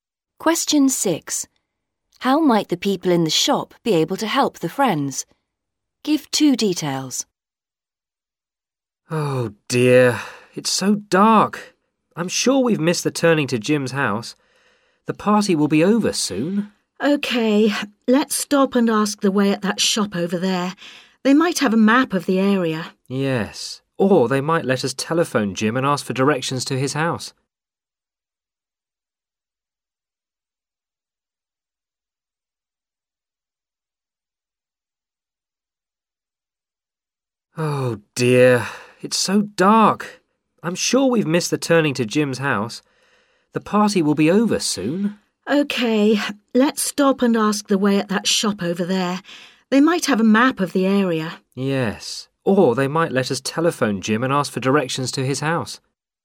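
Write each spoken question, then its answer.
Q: How might the people in the shop be able to help the friends?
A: They might have a map of the area; they might let them telephone Jim for directions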